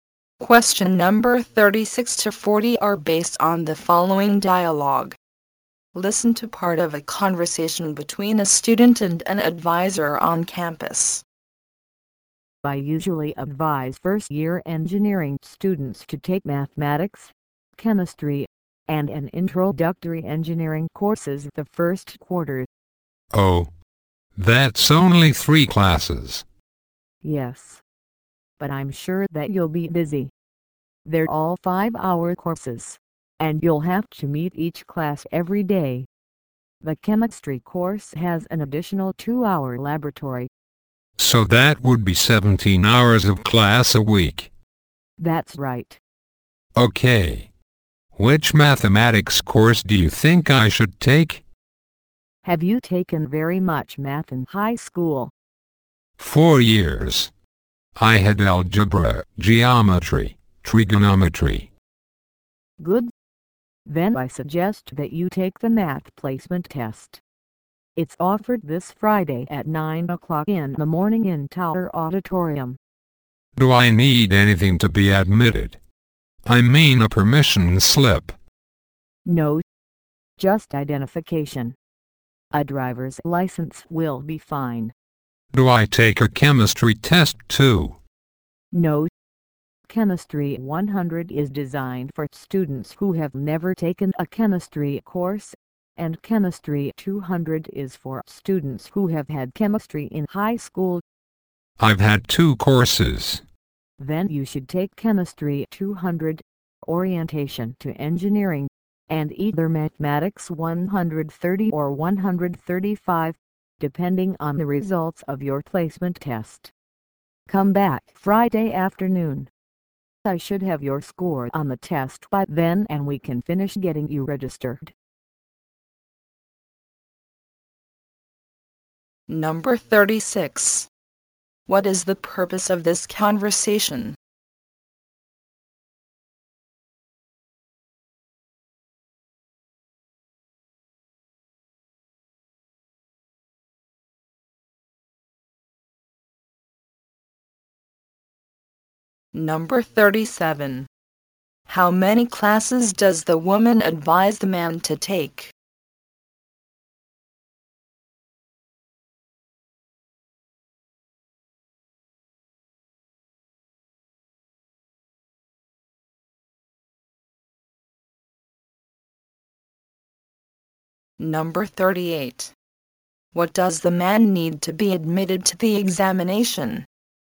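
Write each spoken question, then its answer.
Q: How many classes does the woman advise the man to take?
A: Three.

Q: What does the man need to be admitted to the examination?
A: Identification, such as a driver's license.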